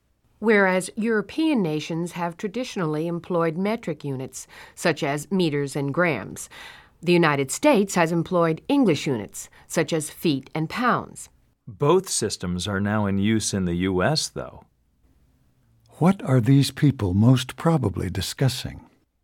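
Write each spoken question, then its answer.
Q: What are these people most probably discussing?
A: Systems of measurement (metric and English units).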